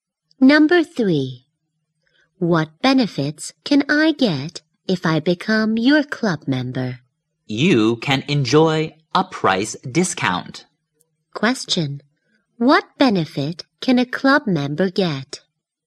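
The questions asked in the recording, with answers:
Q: What benefit can a club member get?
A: A price discount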